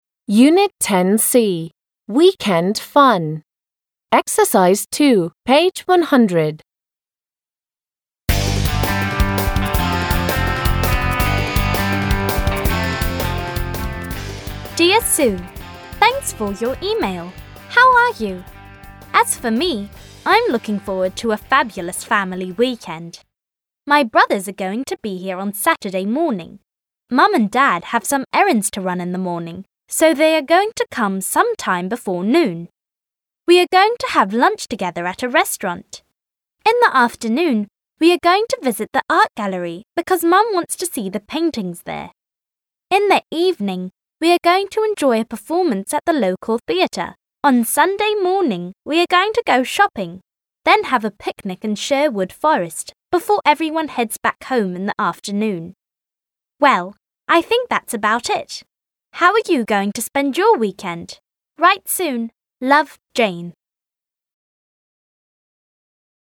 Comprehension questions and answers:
2. Прослушайте и прочитайте электронное письмо ниже. Сколько видов деятельности, изображенных на картинках, упоминается? Что собирается делать Джейн утром в субботу/воскресенье? Днем? Вечером?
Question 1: What is she going to do on Saturday evening?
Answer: She is going to go to the local theatre.

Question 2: What is Jane going to do on Sunday morning?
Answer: She's going to go shopping and then she's going to have a picnic.

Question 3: What is she going to do in the afternoon?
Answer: She's going to head back home.

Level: 6 класс